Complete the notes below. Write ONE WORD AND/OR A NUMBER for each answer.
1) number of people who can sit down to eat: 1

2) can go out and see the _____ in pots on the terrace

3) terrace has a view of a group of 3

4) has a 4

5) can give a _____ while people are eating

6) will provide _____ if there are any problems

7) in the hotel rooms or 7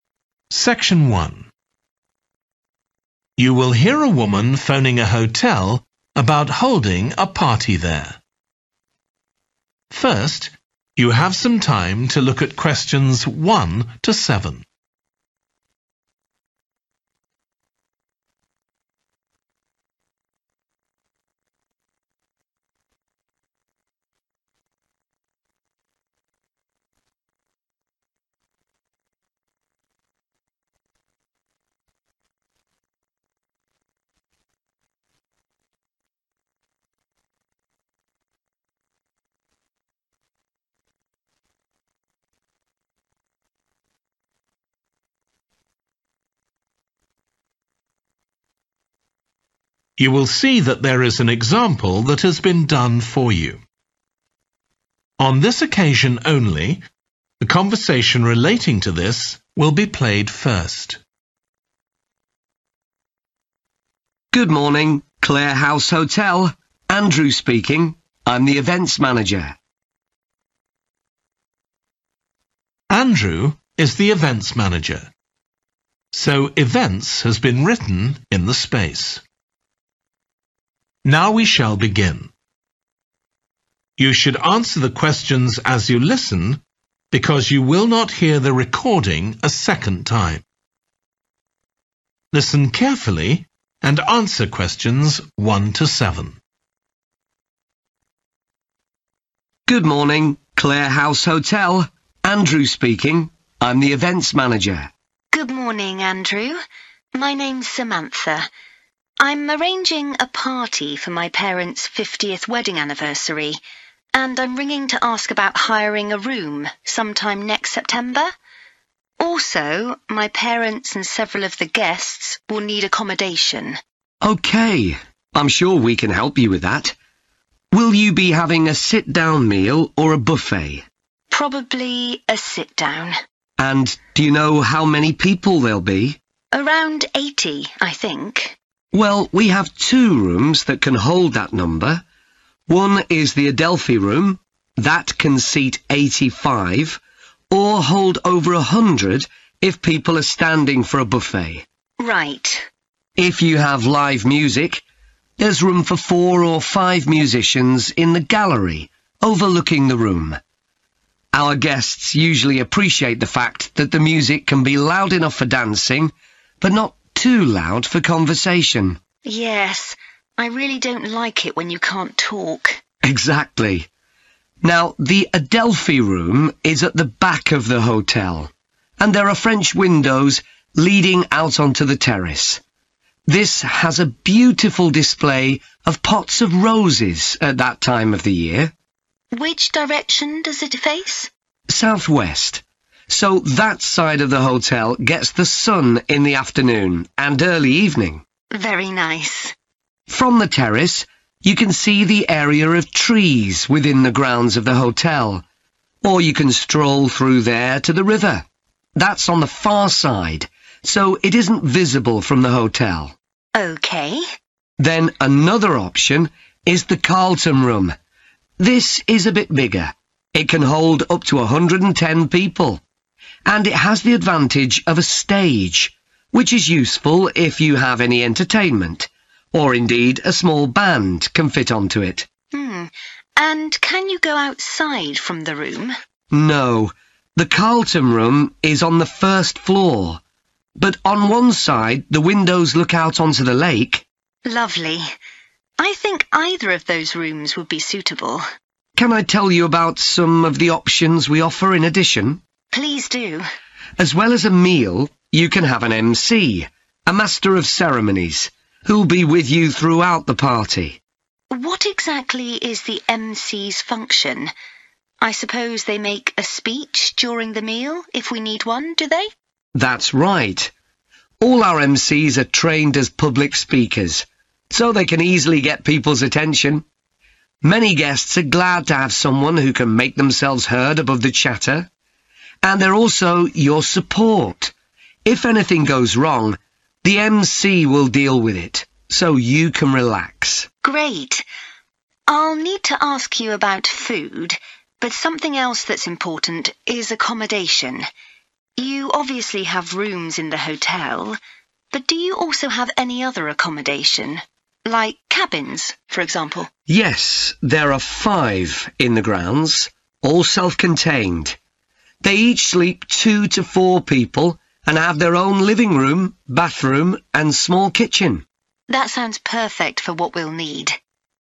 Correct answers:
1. 85
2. roses
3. trees
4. stage
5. speech
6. support
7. cabins

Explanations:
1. The correct answer matches with the information provided in the excerpt where it is mentioned that the room can seat eighty-five people. This shows that the answer is accurate and aligns with the context of the question.
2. The correct answer 'roses' is right because the excerpt says there are pots of roses on the terrace.
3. The correct answer 'trees' is right because the excerpt tells us that we can see trees from the terrace, and it also says we can walk through those trees. So, the answer is talking about the trees that are near the hotel.
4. The correct answer 'stage' is appropriate because it matches the description in the excerpt, which mentions the advantage of having a stage in the larger room for performances or speeches.
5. The correct answer matches the context of inquiring about someone delivering a speech during a meal at an event, which aligns with the role of a Master of Ceremonies as mentioned in the excerpt.
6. The correct answer aligns with the idea that help or assistance is available, as mentioned in the excerpt regarding 'support'. It matches the context of someone being there to offer aid or help when needed.
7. The correct answer aligns with the context of the excerpt where cabins were presented as a type of accommodation that the speaker inquired about.

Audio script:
ANDREW: Good morning, Clare House Hotel. Andrew speaking. I'm the Events Manager.
SAM: Good morning, Andrew. My name's Samantha. I'm arranging a party for my parents' fiftieth wedding anniversary, and I'm ringing to ask about hiring a room some time next September. Also my parents and several of the guests will need accommodation.
ANDREW: OK, I'm sure we can help you with that. Will you be having a sit-down meal or a buffet?
SAM: Probably a sit-down.
ANDREW: And do you know how many people there'll be?
SAM: Around eighty, I think.
ANDREW: Well we have two rooms that can hold that number. One is the Adelphi Room. That can seat eighty-five, or hold over a hundred if people are standing for a buffet.
SAM: Right.
ANDREW: If you have live music, there's room for four or five musicians in the gallery overlooking the room. Our guests usually appreciate the fact that the music can be loud enough for dancing, but not too loud for conversation.
SAM: Yes, I really don't like it when you can't talk.
ANDREW: Exactly. Now the Adelphi Room is at the back of the hotel, and there are French windows leading out onto the terrace. This has a beautiful display of pots of roses at that time of the year.
SAM: Which direction does it face?
ANDREW: Southwest, so that side of the hotel gets the sun in the afternoon and early evening.
SAM: Very nice.
ANDREW: From the terrace you can see the area of trees within the grounds of the hotel, or you can stroll through there to the river – that's on the far side, so it isn't visible from the hotel.
SAM: OK.
ANDREW: Then another option is the Carlton Room. This is a bit bigger – it can hold up to a hundred and ten people – and it has the advantage of a stage, which is useful if you have any entertainment, or indeed a small band can fit onto it.
SAM: And can you go outside from the room?
ANDREW: No, the Carlton Room is on the first floor, but on one side the windows look out onto the lake.
SAM: Lovely. I think either of those rooms would be suitable.
ANDREW: Can I tell you about some of the options we offer in addition?
SAM: Please do.
ANDREW: As well as a meal, you can have an MC, a Master of Ceremonies, who'll be with you throughout the party.
SAM: What exactly is the MC's function? I suppose they make a speech during the meal if we need one, do they?
ANDREW: That's right. All our MCs are trained as public speakers, so they can easily get people's attention – many guests are glad to have someone who can make themselves heard above the chatter! And they're also your support – if anything goes wrong, the MC will deal with it, so you can relax.
SAM: Great! I'll need to ask you about food, but something else that's important is accommodation. You obviously have rooms in the hotel, but do you also have any other accommodation, like cabins, for example?
ANDREW: Yes, there are five in the grounds, all self-contained. They each sleep two to four people and have their own living room, bathroom and small kitchen.
SAM: That sounds perfect for what we'll need.